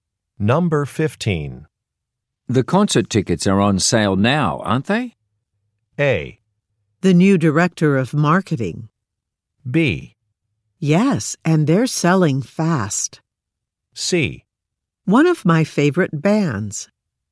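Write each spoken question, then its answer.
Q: The concert tickets are on sale now, aren't they?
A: B: Yes, and they're selling fast.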